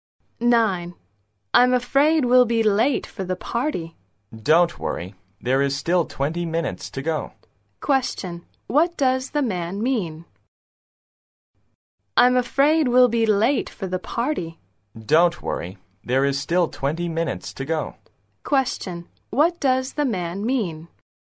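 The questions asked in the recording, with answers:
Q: What does the man mean?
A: They won't be late; there are still 20 minutes.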